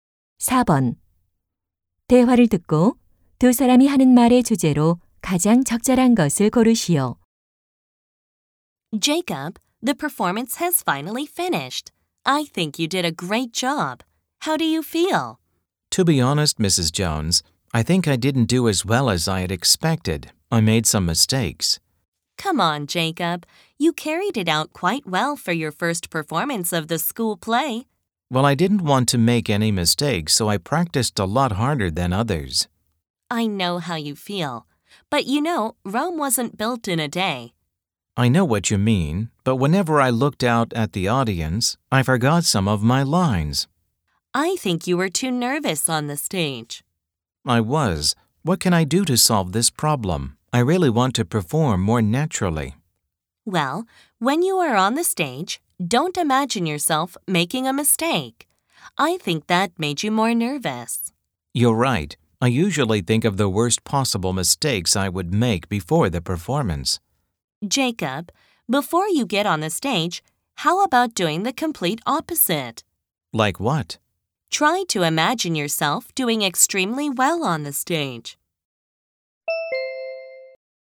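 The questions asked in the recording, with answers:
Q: 대화를 듣고 두 사람이 하는 말의 주제로 가장 적절한 것을 고르시오.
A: 무대 긴장을 극복하는 방법 (잘하는 모습 상상하기)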